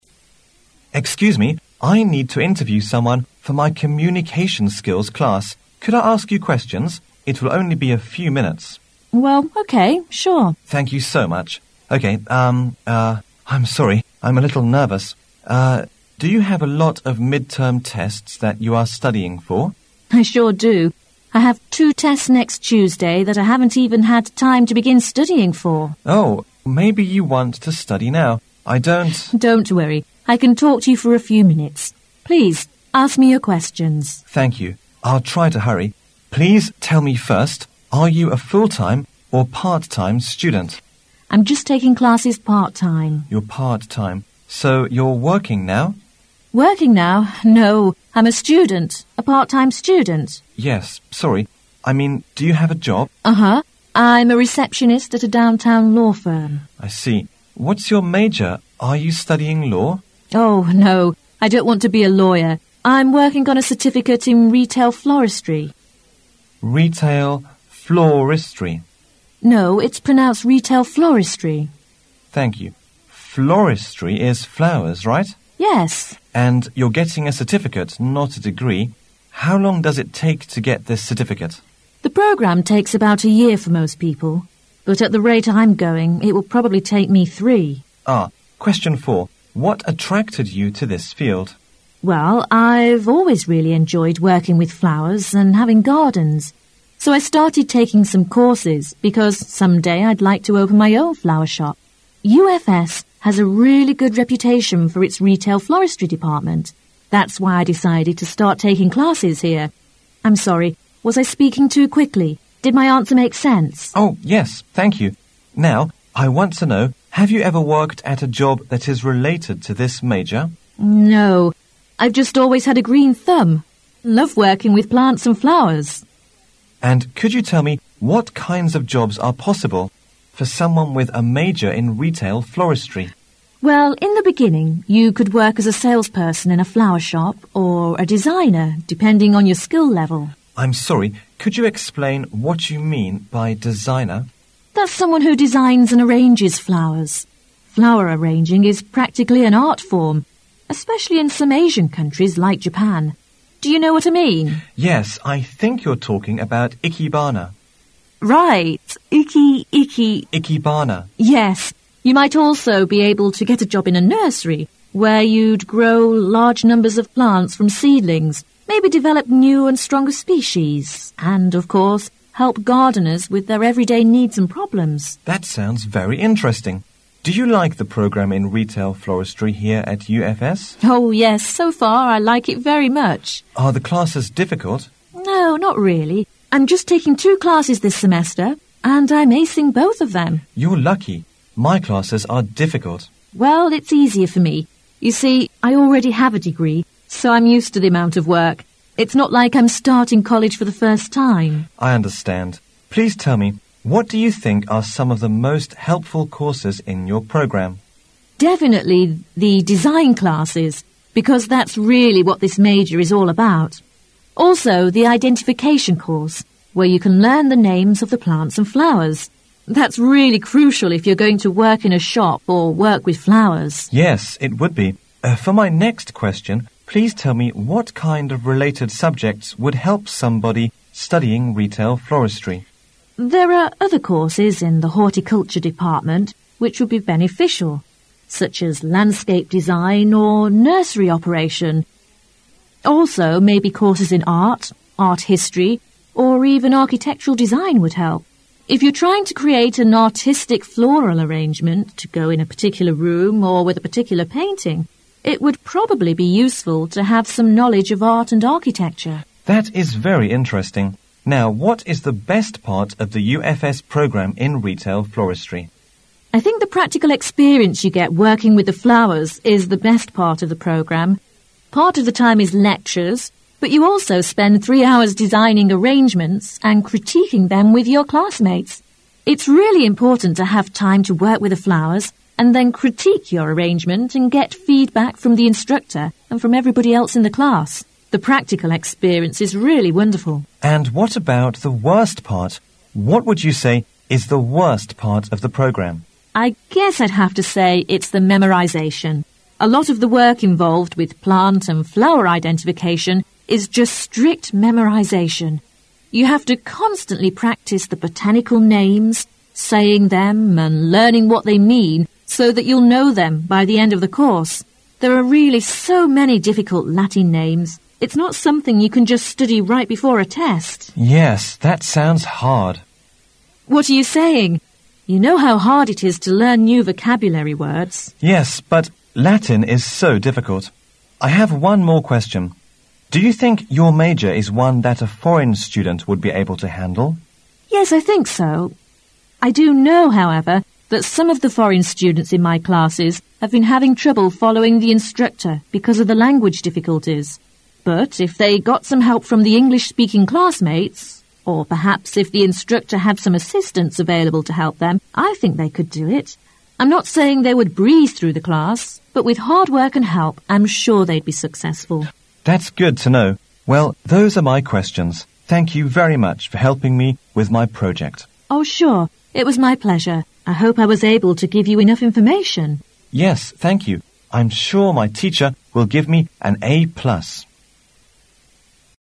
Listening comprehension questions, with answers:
You will hear an interview between Reiko and Kitty. As you listen, answer the questions or complete the notes in your test booklet for Questions 21 to 30 by writing NOT MORE THANTHREE words in the space provided on the right.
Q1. At what time of the year does this interview take place?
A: Around mid-term

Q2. How long does it usually take a student to finish the retail floristry certificate program?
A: One year

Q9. What does she think is bad about the program?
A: Latin names

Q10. What is the trouble for foreign students in her class to follow the instructor?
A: Language difficulties

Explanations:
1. 在采访一开始Reiko就对Kitty谈到:"I'm a little nervous.Uh, do you have a lot of mid-term test that you are studying for?"Kitty回答说"I sure do.I have two tests next Tuesday that..."从这里我们可以推测这次采访是在学校期中考试时发生的。
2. 从采访中我们得知Kitty正在读鲜花零售证书。要想获得此证书需要一年的时间。
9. 当采访者问Kitty最不好学的课程是什么时Kitty说拉丁语花名最不好记。

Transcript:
[解析] 21-30 Reiko: Excuse me. I need to interview someone for my Communications Skills class. Could I ask you questions? It will only be a few minutes. Kitty: Well, okay. Sure. Reiko: Thank you so much. Okay, urn, uh, I'm sorry; I'm a little nervous. Uh, do you have a lot of midterm tests that you are studying for? Kitty: I sure do. I have two tests next Tuesday that I haven't had time to begin studying for. Reiko: Oh! Maybe you want to study now. I don't. Kitty: Don't worry. I can talk to you for a few minutes. Please, ask me your questions. I will try to hurry.. Please tell me first, are you a full-time or part-time student? Kitty: I'm just taking classes part time. Reiko: You are part-time. So you are working now? Kitty: Working now? A part-time student. Reiko: Yes. Sorry. I mean do you have a job? Kitty: Uh huh I'm a receptionist at a downtown law firm. Reiko: I see. What is your major? Are you studying law? Kitty: Oh, no. I don't want to be a lawyer. I'm working on a certificate in retail floristry. Reiko: Retail floristry. Kitty: No, it's pronounced retail floristry. Reiko: Thank you. Floristry is flowers, right? Kitty: Yes. Reiko: And, you are getting a certificate, not a degree. How long does it take to get this certificate? Kitty: The program takes about a year for most people, but at the rate I'm going, it will probably take me three. Reiko: Ah Question four: What attracted you to this field? Kitty: Well, I've always really enjoyed working with flowers and having gardens, so I started taking some courses because someday I'd like to open my own flower shop. UFS has a really good reputation for its retail floristry department. That's why I decided to start taking classes here. I'm sorry; was I speaking too quickly? Did my answer make sense? Reiko: Oh, yes, thank you. Now, I want to know, have you ever worked at a job that is related to this major? Kitty: No. I've just always had a groan thumb and loved working with plants and flowers. Reiko: Arid, could you tell me what kinds of jobs are possible for someone with a major in retail floristry? Kitty: Well, in the beginning, you could work as a salesperson in a flower shop or a designer depending on your skill level. Reiko: I'm sorry; could you explain what you mean by designer? Kitty: That's someone who designs and arranges flowers. Flower arranging is practically an art form, especially in some Asian countries like Japan. Do you know what I mean? Reiko: Yes. I think you are talking about Ikebana. Kitty: Right! Ike-Ike Reiko: Ikebana. Kitty: Yes. You might also be able to get a job in a nursery, where you'd grow large numbers of plants from seedlings, maybe develop new and stronger species, and, of course, help gardeners with their everyday needs and problems. Reiko: That sounds very interesting. Do you like the program in retail floristry here at UFS? Kitty: Oh, yes, so far, I like it very much. Reiko: Are the classes difficult? Kitty: No, not really. I'm just taking two classes this semester, and I'm acing both of them. Reiko: You are lucky. My classes are difficult. Kitty: Well, it's easier for me. You see, I already have a degree, so I'm used to the amount of work. It's not like I'm starting college for the first time. Reiko: I understand. Please tell me, what do you think are some of the most helpful courses in your program? Kitty: Definitely the design classes because that's really what this major is all about. Also, the identification course, where you can learn the names of the plants and flowers. That is really crucial if you are going to work in a shop or work with flowers. Reiko: Yes, it would be. For my next question, please tell me what kind of related subjects would help somebody studying retail floristry? Kitty: There are other courses in the horticulture department which would be beneficial, such as landscape design or nursery operation. Also, maybe courses in art, art history, or even architectural design would help. If you're trying to create an artistic floral arrangement to go in a particular room or with a particular painting, it would probably be useful to have some knowledge of art and architecture. Reiko: That is very interesting. Now, what is the best part of the UFS program in retail floristry? Kitty: I think the practical experience you get working with the flowers is the best part of the program. Part of the time is lectures, but you also spend three hours designing arrangements and critiquing them with your classmates. It's really important to have time to work with the flowers and then critique your arrangement and get feedback from the instructor and from everybody else in the class. The practical experience is really wonderful. Reiko: And, what about the worst part? What would you say is the worst part of the program? Kitty: I guess I'd have to say it's the memorization. A lot of the work involved with plant and flower identification is just strict memorization. You have to constantly practice the botanical names, saying them and learning what they mean so that you'll know them by the end of the course. There are really so many difficult Latin names. It's not something you can just study right before a test. Reiko: Yes, that sounds hard. Kitty: What are you saying? You know how hard it is to learn new vocabulary words! Reiko: Yes, but Latin is so difficult! I have one more question: Do you think your major is one that a foreign student would be able to handle? I do know, however, that some of the foreign students in my classes have been having trouble following the instructor because of the language difficulties. But, if they got some help from English- speaking classmates, or, perhaps if the instructor had some assistants available to help them, I think they could do it. I'm not saying they would breeze through the class, but, with hard work and help, I'm sure they'd be successful. Reiko: That's good to know. Well, those are my questions: Thank you very much for helping me with my project. Kitty: Oh, sure. It was my pleasure. I hope I was able to give you enough information. Reiko: Yes, thank you. I'm sum my teacher will give me an A plus!